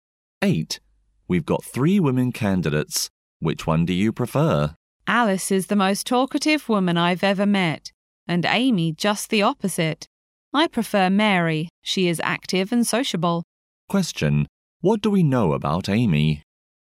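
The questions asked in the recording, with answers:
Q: What do we know about Amy?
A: She is quiet and doesn't talk much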